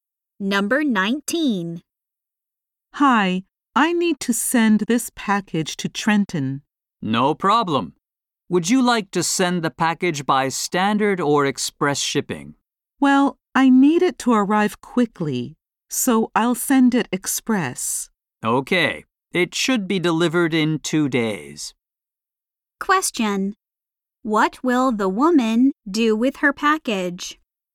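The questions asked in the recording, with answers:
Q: What will the woman do with her package?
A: Send it by express shipping.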